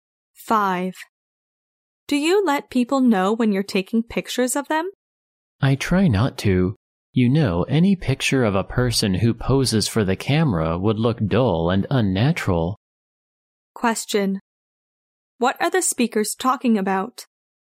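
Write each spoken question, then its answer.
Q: What are the speakers talking about?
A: Taking pictures of people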